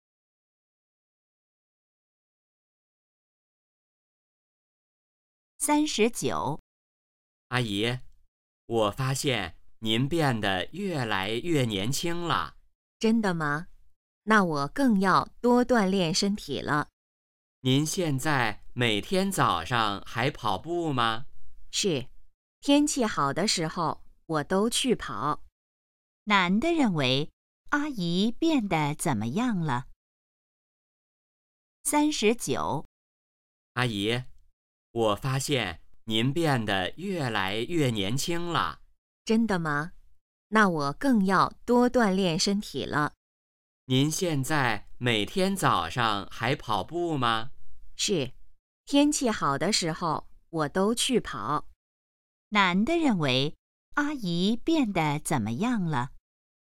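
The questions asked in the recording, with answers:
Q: 男的认为阿姨变得怎么样了?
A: 越来越年轻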